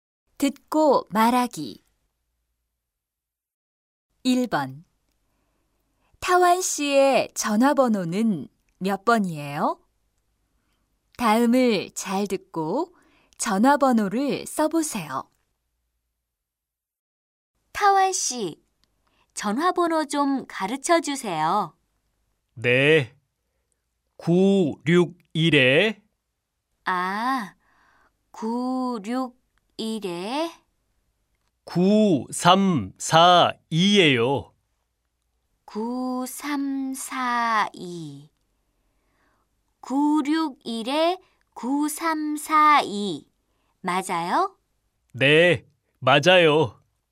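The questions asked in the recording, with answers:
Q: 타완 씨의 전화번호는 몇 번이에요?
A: 961-9342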